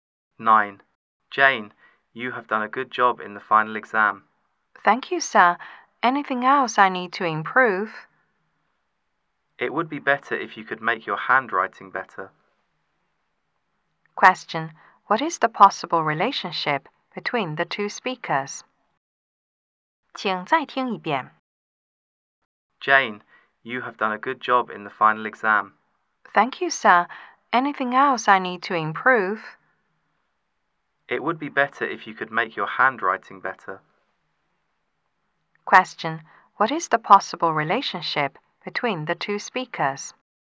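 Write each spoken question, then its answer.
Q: What is the possible relationship between the two speakers?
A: Teacher and student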